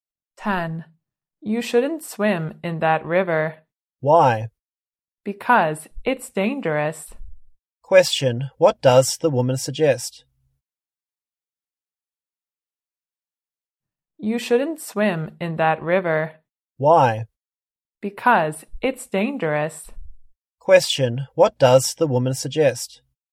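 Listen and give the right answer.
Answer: Not swimming in that river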